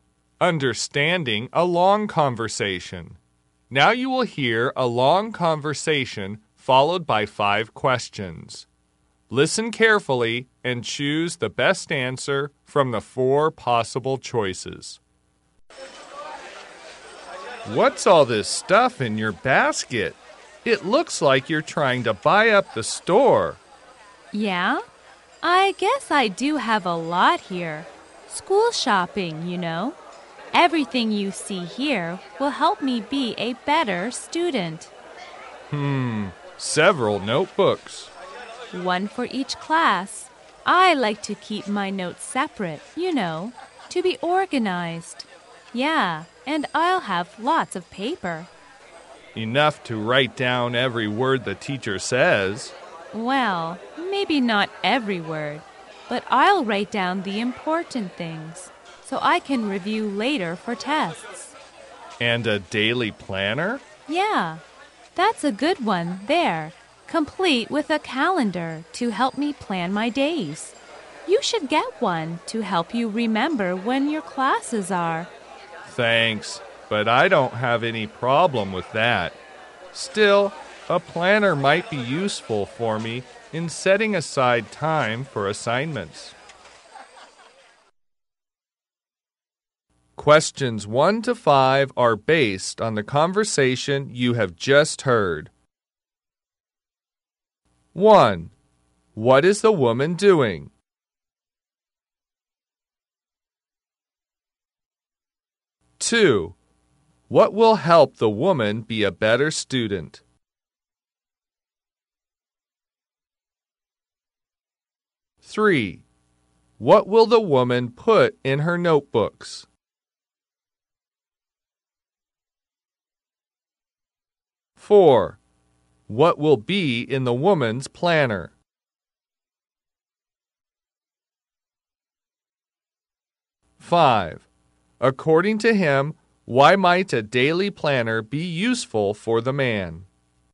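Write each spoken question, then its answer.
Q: What is the woman doing?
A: Shopping for school supplies.

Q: What will help the woman be a better student?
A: The things she's buying, such as notebooks, paper and a planner.

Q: What will the woman put in her notebooks?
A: Notes for each class, kept separate.

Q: What will be in the woman's planner?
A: A calendar.

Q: According to him, why might a daily planner be useful for the man?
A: For setting aside time for assignments.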